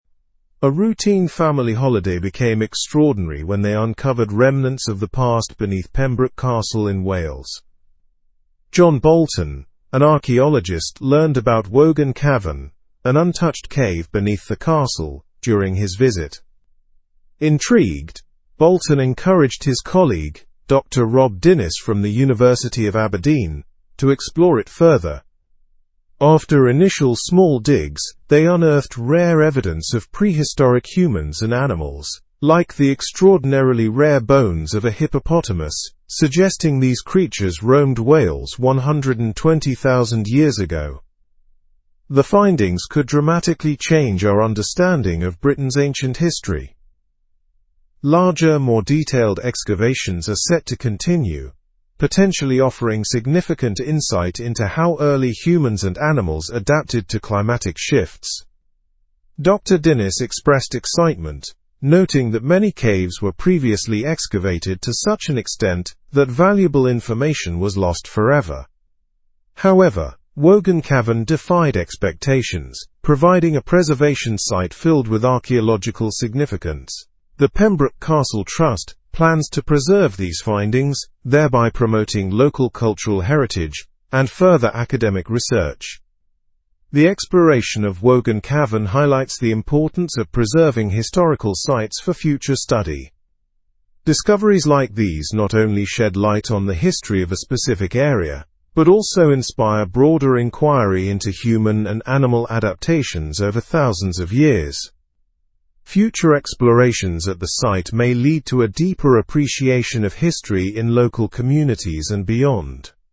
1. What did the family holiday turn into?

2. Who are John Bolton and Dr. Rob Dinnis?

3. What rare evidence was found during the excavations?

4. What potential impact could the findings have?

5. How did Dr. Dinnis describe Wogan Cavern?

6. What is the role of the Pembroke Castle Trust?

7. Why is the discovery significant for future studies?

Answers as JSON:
{"1": "An extraordinary exploration of a historical site beneath Pembroke Castle.", "2": "John Bolton is an archaeologist, and Dr. Rob Dinnis is his colleague from the University of Aberdeen.", "3": "Rare evidence of prehistoric humans and hippopotamus bones.", "4": "They could dramatically change our understanding of Britain's ancient history.", "5": "As a preservation site filled with archaeological significance.", "6": "To preserve the findings and promote local cultural heritage and further academic research.", "7": "It sheds light on human and animal adaptations over thousands of years, inspiring broader inquiry."}

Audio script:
A routine family holiday became extraordinary when they uncovered remnants of the past beneath Pembroke Castle in Wales. John Bolton, an archaeologist, learned about Wogan Cavern, an untouched cave beneath the castle, during his visit. Intrigued, Bolton encouraged his colleague, Dr. Rob Dinnis from the University of Aberdeen, to explore it further.
After initial small digs, they unearthed rare evidence of prehistoric humans and animals, like the extraordinarily rare bones of a hippopotamus, suggesting these creatures roamed Wales 120,000 years ago. The findings could dramatically change our understanding of Britain's ancient history. Larger, more detailed excavations are set to continue, potentially offering significant insight into how early humans and animals adapted to climatic shifts.
Dr. Dinnis expressed excitement, noting that many caves were previously excavated to such an extent that valuable information was lost forever. However, Wogan Cavern defied expectations, providing a preservation site filled with archaeological significance. The Pembroke Castle Trust plans to preserve these findings, thereby promoting local cultural heritage and further academic research.
The exploration of Wogan Cavern highlights the importance of preserving historical sites for future study. Discoveries like these not only shed light on the history of a specific area but also inspire broader inquiry into human and animal adaptations over thousands of years. Future explorations at the site may lead to a deeper appreciation of history in local communities and beyond.

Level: Level 3